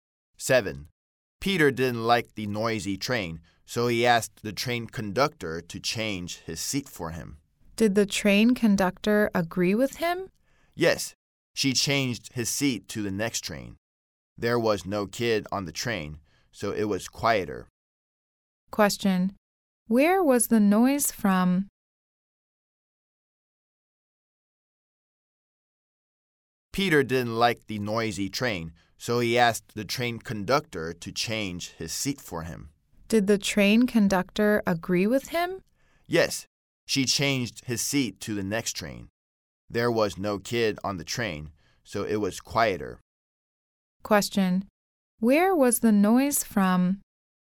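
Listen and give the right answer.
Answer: From the kids on the train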